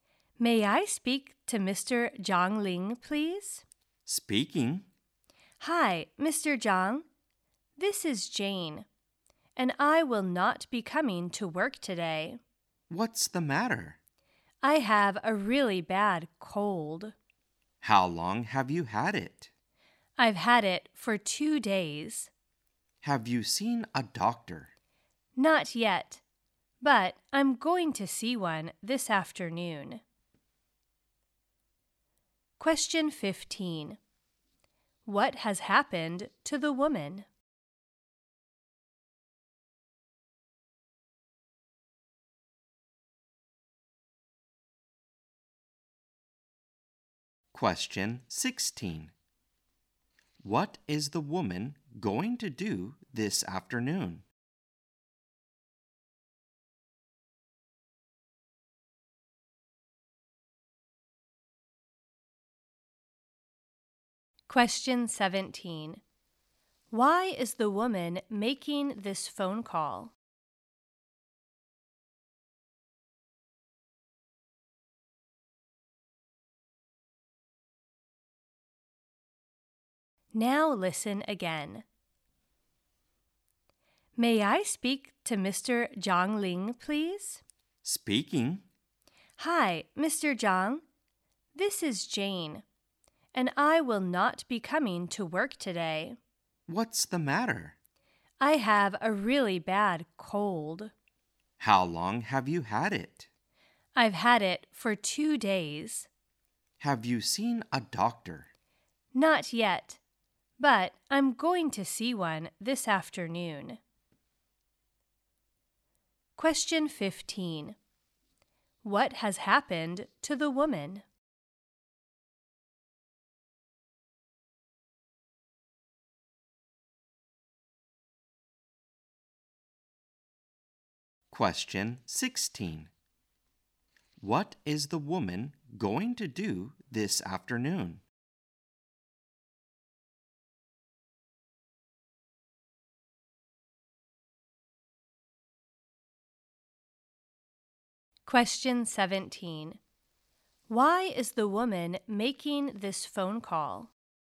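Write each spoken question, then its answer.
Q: What has happened to the woman?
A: She has a bad cold

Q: What is the woman going to do this afternoon?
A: See a doctor

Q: Why is the woman making this phone call?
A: To say she won't come to work today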